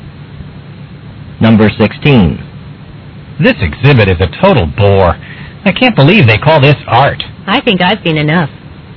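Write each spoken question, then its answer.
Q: What will the woman probably do next?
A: Leave the exhibit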